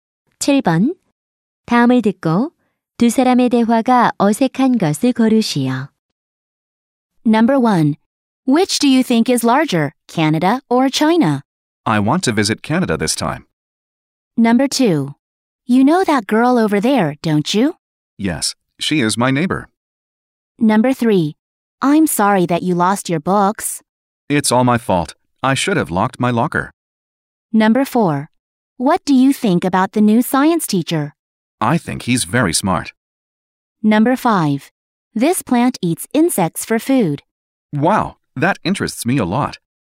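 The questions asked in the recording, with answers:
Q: 다음을 듣고 두 사람의 대화가 어색한 것을 고르시오.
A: 1: Which do you think is larger, Canada or China? / I want to visit Canada this time.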